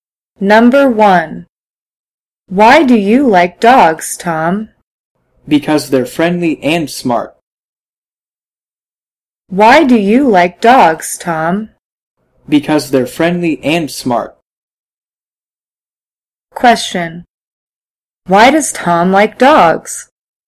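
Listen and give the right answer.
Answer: Because they're friendly and smart.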